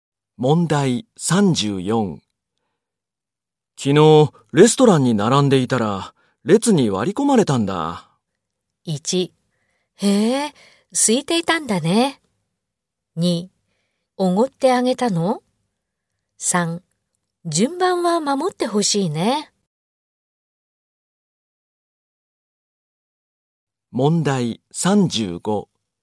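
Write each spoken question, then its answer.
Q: 昨日レストランに並んでいたら列に割り込まれたんだ。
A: 3: 順番は守ってほしいね。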